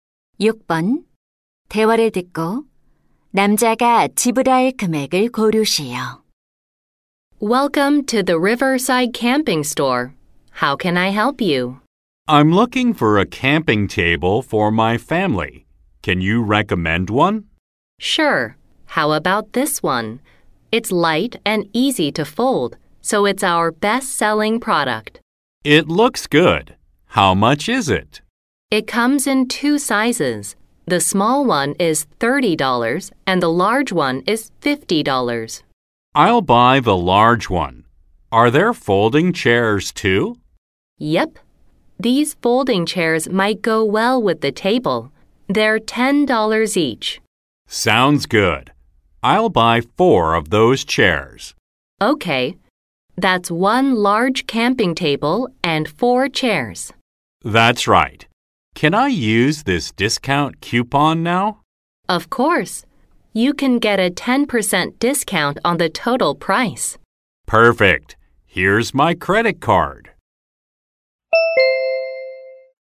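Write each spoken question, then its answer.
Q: 대화를 듣고 남자가 지불할 금액을 고르시오.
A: 81달러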